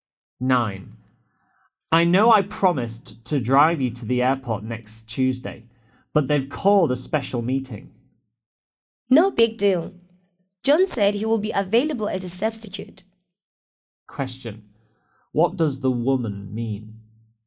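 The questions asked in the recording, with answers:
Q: What does the woman mean?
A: It's no problem; John can drive her instead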